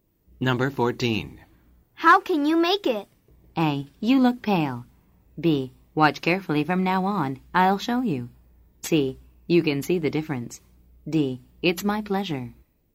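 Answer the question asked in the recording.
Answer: B: Watch carefully from now on. I'll show you.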